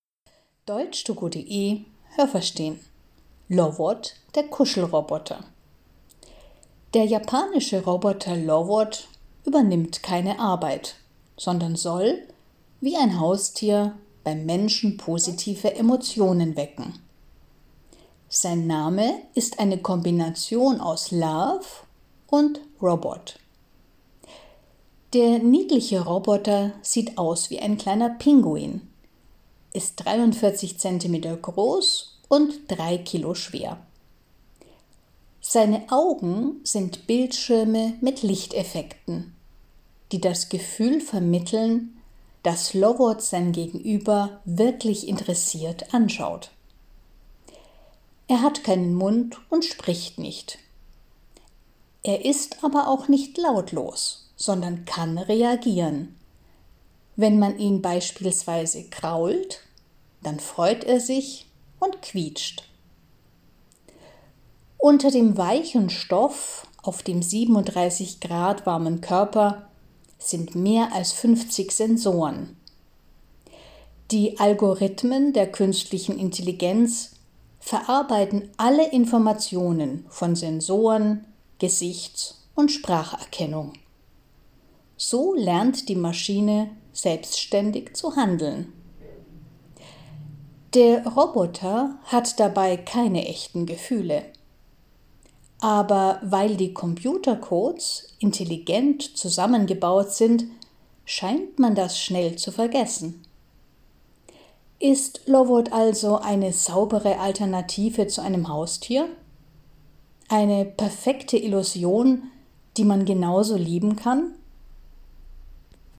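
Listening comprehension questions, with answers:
Was haben Sie gehört? Es gibt nur eine korrekte Antwort.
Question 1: Der japanische Roboter soll ...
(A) dem Menschen bei der Arbeit helfen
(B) positive Emotionen wecken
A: (B) positive Emotionen wecken

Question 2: Der Roboter ist ...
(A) in Wirklichkeit ein Pinguin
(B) 43 cm groß und wiegt 3 Kilo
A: (B) 43 cm groß und wiegt 3 Kilo

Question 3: Wenn man in Lovots Augen schaut, sieht man ...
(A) echtes Interesse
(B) nur einen Bildschirm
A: (B) nur einen Bildschirm

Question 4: Er hat keinen Mund, ...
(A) aber er kann Töne produzieren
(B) deshalb kann er keine Töne produzieren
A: (A) aber er kann Töne produzieren

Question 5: Auf seinem Körper ...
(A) ist ein weicher Stoff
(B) sind 50 Sensoren mit 37 Grad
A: (A) ist ein weicher Stoff

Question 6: Die künstliche Intelligenz macht es möglich, dass Lovots ...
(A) echte Gefühle entwickeln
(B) selbstständig handeln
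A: (B) selbstständig handeln

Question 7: Für manche Menschen sind Lovots ...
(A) nur Computercodes, die man schnell vergisst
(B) eine saubere Alternative zu Haustieren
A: (B) eine saubere Alternative zu Haustieren

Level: B1

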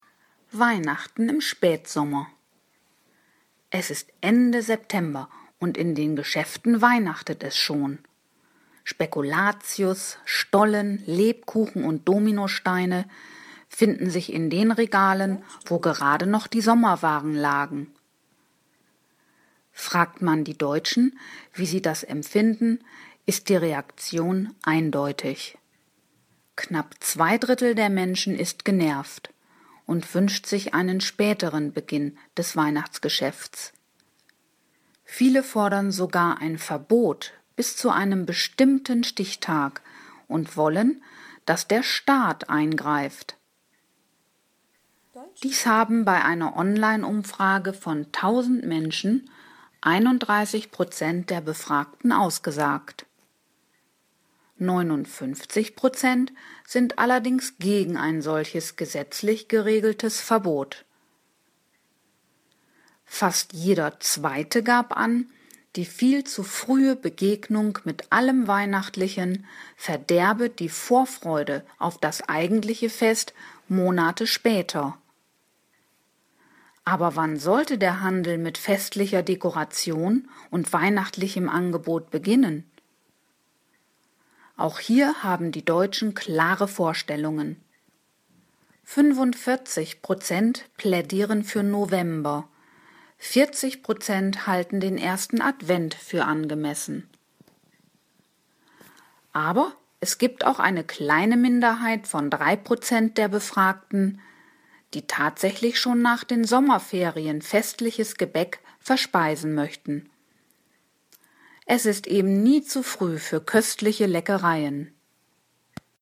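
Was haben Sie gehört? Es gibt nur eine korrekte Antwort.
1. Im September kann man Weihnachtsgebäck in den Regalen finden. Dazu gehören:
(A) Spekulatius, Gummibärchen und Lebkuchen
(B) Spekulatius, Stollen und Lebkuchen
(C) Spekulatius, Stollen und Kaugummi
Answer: (B) Spekulatius, Stollen und Lebkuchen

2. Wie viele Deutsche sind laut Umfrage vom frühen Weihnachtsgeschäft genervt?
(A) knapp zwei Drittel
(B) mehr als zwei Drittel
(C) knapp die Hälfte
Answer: (A) knapp zwei Drittel

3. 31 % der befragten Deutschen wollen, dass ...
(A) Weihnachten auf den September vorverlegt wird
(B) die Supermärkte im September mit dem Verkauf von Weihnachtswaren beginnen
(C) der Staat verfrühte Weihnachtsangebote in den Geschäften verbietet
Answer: (C) der Staat verfrühte Weihnachtsangebote in den Geschäften verbietet

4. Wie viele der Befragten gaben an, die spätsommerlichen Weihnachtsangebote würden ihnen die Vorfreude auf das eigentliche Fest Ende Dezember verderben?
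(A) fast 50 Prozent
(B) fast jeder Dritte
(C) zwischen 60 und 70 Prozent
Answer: (A) fast 50 Prozent

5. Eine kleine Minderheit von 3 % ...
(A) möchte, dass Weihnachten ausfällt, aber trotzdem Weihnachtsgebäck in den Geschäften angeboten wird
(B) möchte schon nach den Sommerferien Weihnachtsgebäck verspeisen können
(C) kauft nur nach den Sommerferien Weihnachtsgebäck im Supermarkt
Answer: (B) möchte schon nach den Sommerferien Weihnachtsgebäck verspeisen können

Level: C1

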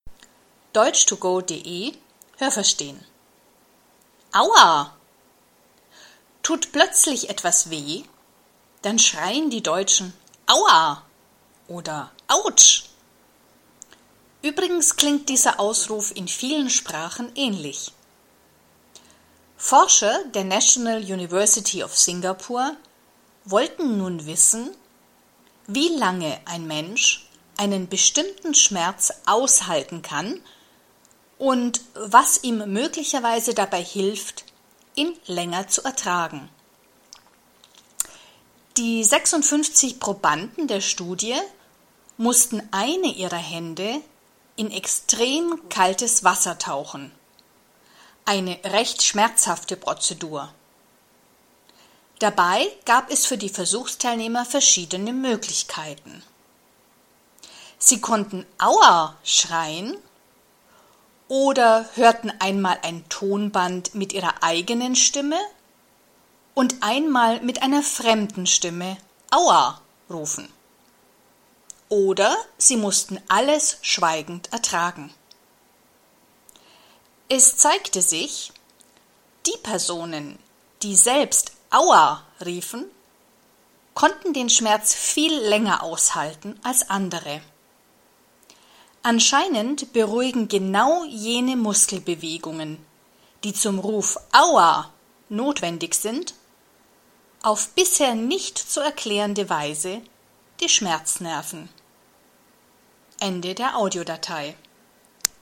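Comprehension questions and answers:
Es gibt nur eine korrekte Antwort.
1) Die Deutschen schreien „Aua!", wenn sie Schmerzen haben.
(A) In anderen Sprachen sagt man in dieser Situation nichts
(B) Auf der ganzen Welt sagt man "Aua!"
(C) In anderen Sprachen sagt man etwas Ähnliches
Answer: (C) In anderen Sprachen sagt man etwas Ähnliches

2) Forscher der Universität Singapur wollten wissen, ...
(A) was dem Menschen hilft, Schmerzen länger zu ertragen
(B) welche Schmerzen Menschen gut ertragen können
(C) wie lange Menschen eiskaltes Wasser ertragen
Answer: (A) was dem Menschen hilft, Schmerzen länger zu ertragen

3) Wie viele Probanden nahmen an der Studie teil?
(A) 650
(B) 56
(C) 65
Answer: (B) 56

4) Was mussten die Teilnehmer tun?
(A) Sie mussten zwei Hände in kaltes Wasser tauchen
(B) Sie mussten die rechte Hand in kaltes Wasser tauchen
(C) Sie mussten eine Hand in kaltes Wasser tauchen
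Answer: (C) Sie mussten eine Hand in kaltes Wasser tauchen

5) Aus wie vielen Möglichkeiten mussten die Versuchsteilnehmer wählen?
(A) aus 3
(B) aus 4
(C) aus 5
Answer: (B) aus 4

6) Wer konnte die Schmerzen am längsten aushalten?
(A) Teilnehmer, die die Schmerzen schweigend ertrugen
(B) Teilnehmer, die selbst "Aua!" riefen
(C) Teilnehmer, die eine fremde Stimme "Aua!" schreien hörten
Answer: (B) Teilnehmer, die selbst "Aua!" riefen

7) Der Ausruf „Aua!" ...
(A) beruhigt anscheinend die Schmerznerven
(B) bewegt nur Muskeln und hat sonst keinen Effekt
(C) muss viel länger gerufen werden, wenn er beruhigen soll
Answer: (A) beruhigt anscheinend die Schmerznerven

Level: B1

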